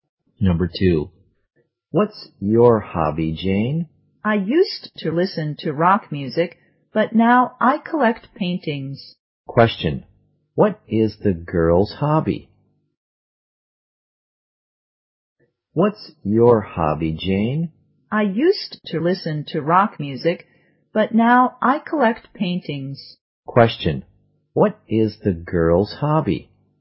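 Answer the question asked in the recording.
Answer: Collecting paintings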